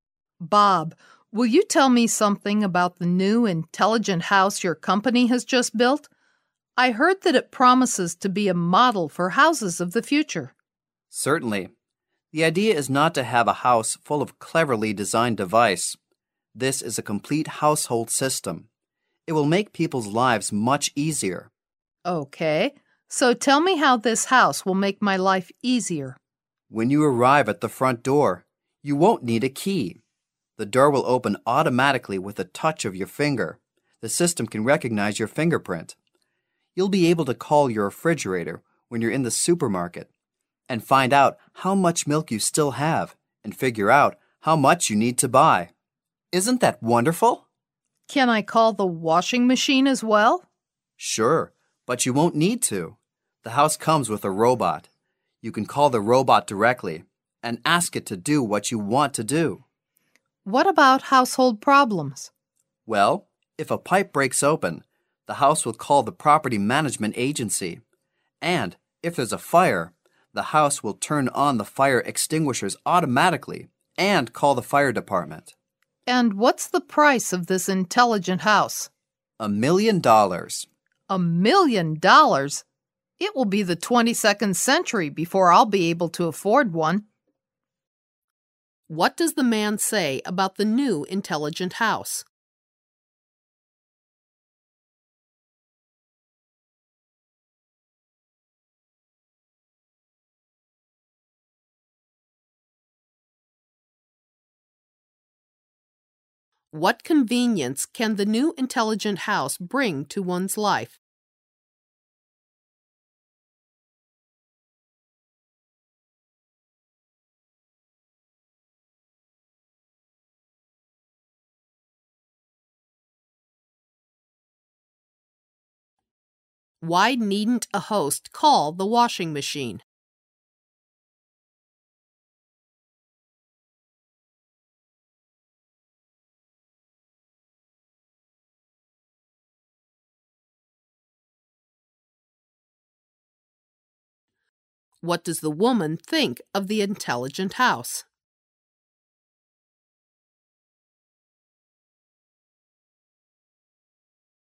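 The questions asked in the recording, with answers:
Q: What does the man say about the new intelligent house?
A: It is a complete household system that will make people's lives much easier.

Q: Why needn't a host call the washing machine?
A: The house comes with a robot that can be called to do the work.

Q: What does the woman think of the intelligent house?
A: It is too expensive for her to afford.

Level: 大学英语四级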